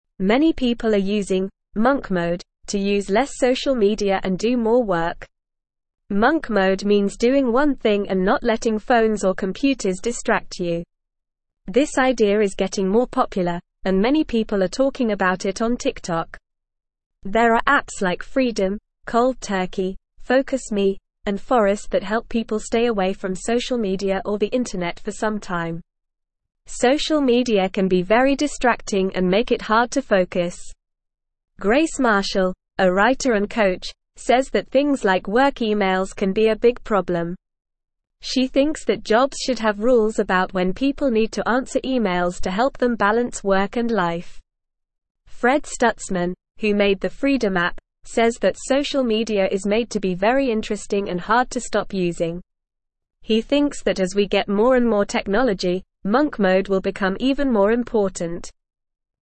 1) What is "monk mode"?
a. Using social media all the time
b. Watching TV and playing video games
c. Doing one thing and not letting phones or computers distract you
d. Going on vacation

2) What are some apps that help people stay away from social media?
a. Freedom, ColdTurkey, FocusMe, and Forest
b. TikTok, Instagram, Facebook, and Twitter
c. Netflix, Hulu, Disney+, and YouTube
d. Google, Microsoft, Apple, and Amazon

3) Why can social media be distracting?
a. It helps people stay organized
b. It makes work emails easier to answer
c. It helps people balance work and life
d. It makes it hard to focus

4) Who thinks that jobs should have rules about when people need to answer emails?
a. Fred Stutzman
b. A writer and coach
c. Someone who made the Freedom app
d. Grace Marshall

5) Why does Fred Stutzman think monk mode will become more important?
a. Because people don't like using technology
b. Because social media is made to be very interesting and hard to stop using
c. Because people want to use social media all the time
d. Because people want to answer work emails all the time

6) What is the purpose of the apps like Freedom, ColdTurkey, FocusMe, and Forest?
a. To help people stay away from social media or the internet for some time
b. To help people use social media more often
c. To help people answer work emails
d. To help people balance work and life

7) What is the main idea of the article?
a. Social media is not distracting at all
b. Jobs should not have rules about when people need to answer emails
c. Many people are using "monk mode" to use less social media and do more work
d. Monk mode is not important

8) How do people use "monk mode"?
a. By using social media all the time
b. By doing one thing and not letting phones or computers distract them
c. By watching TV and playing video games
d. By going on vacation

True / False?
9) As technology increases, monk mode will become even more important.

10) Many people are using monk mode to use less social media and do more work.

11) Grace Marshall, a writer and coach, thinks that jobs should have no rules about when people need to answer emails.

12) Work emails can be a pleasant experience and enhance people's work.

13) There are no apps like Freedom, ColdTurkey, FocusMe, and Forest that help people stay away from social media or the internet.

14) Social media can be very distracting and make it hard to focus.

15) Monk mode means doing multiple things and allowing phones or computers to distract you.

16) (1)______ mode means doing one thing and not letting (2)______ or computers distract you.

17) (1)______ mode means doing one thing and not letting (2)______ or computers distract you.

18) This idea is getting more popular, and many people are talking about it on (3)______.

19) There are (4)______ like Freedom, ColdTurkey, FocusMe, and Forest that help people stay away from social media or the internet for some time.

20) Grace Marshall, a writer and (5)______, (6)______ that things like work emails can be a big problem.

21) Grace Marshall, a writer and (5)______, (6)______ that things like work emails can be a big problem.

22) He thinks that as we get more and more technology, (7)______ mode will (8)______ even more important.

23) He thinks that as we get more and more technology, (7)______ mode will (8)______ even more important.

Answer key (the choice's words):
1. Doing one thing and not letting phones or computers distract you
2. Freedom, ColdTurkey, FocusMe, and Forest
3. It makes it hard to focus
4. Grace Marshall
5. Because social media is made to be very interesting and hard to stop using
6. To help people stay away from social media or the internet for some time
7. Many people are using "monk mode" to use less social media and do more work
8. By doing one thing and not letting phones or computers distract them
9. True
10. True
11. False
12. False
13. False
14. True
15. False
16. Monk
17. phones
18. TikTok
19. apps
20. coach
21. says
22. monk
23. become

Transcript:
Monk mode means doing one thing and not letting phones or computers distract you. This idea is getting more popular, and many people are talking about it on TikTok. There are apps like Freedom, ColdTurkey, FocusMe, and Forest that help people stay away from social media or the internet for some time.
Grace Marshall, a writer and coach, says that things like work emails can be a big problem. She thinks that jobs should have rules about when people need to answer emails to help them balance work and life. Fred Stutzman, who made the Freedom app, says that social media is made to be very interesting and hard to stop using. He thinks that as we get more and more technology, monk mode will become even more important.

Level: Level 1